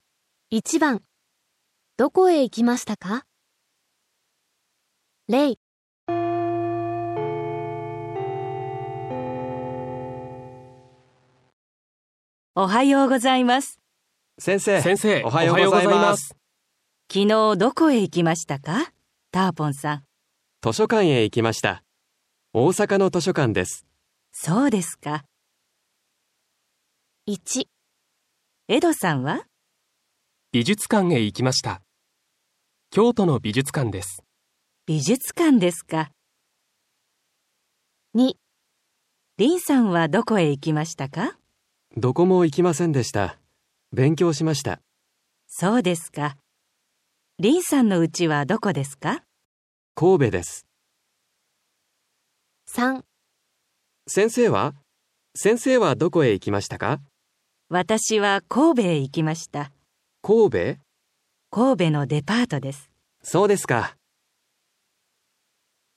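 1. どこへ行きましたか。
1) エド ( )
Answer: 京都の美術館

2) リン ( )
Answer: どこも行きませんでした

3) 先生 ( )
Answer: 神戸のデパート

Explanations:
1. 美術館へ 行きました。京都の 美術館です。
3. A: わたしは 神戸へ 行きました。 D: 神戸? A: 神戸の デパートです。

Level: ÔN TẬP NGHE N5.5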